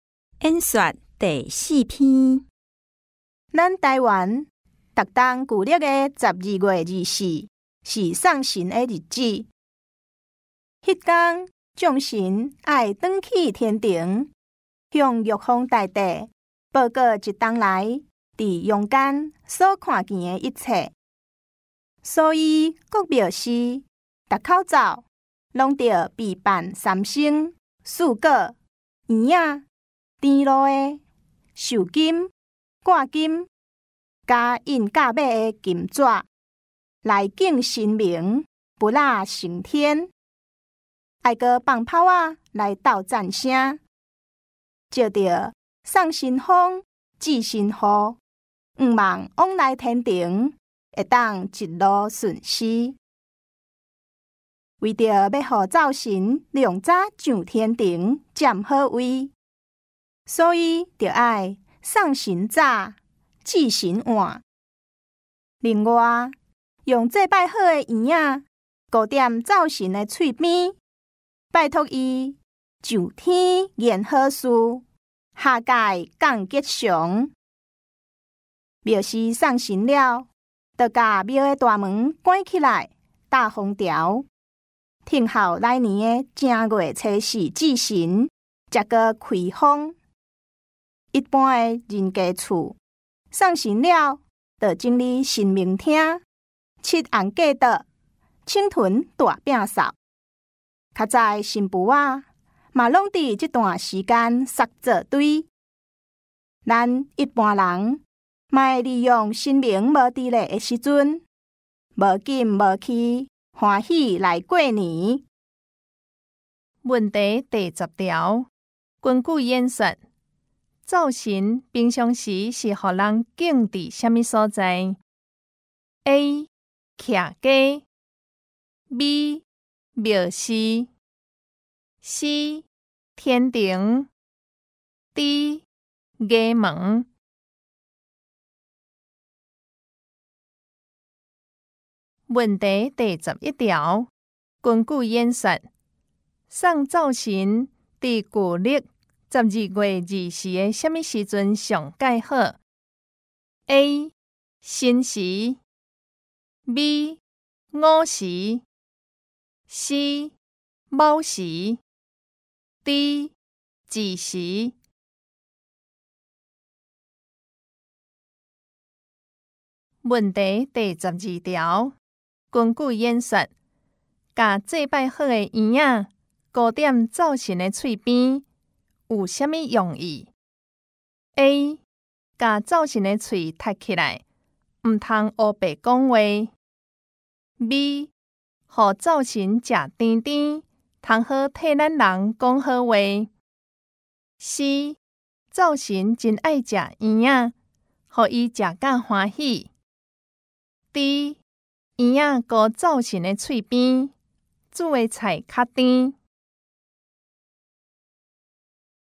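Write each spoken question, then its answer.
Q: 根据演说,把祭拜好的圆仔糕点造型的嘴边,有什么用意 ?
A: B: 和造型食甜甜。通好替咱人讲好话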